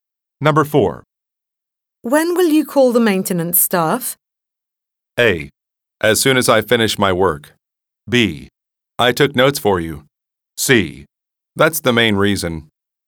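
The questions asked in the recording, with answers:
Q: When will you call the maintenance staff?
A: A: As soon as I finish my work.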